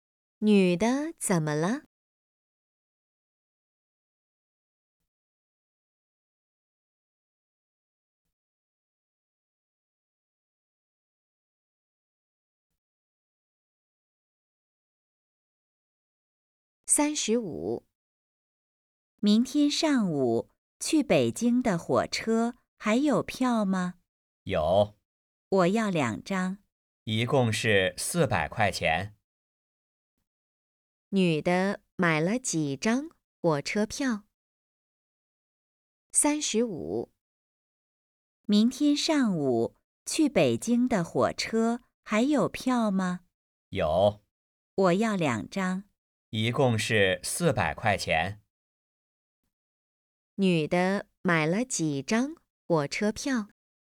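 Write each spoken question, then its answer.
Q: 女的买了几张火车票?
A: 两张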